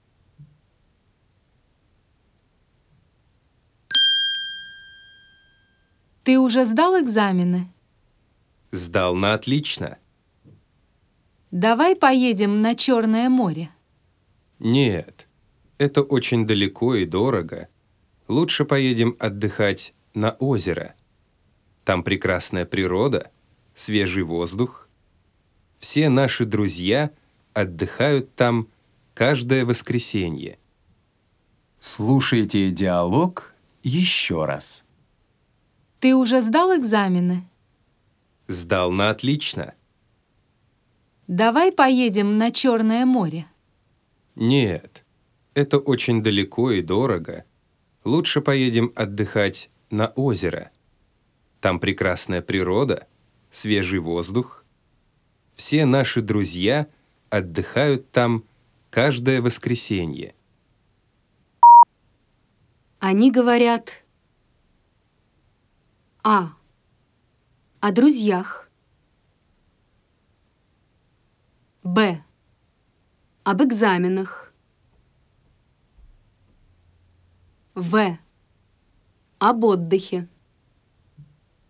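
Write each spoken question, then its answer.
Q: Они говорят.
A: В: Об отдыхе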